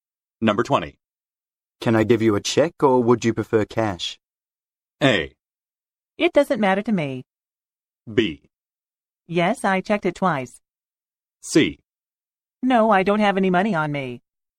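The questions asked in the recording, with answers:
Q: Can I give you a check or would you prefer cash?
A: A: It doesn't matter to me.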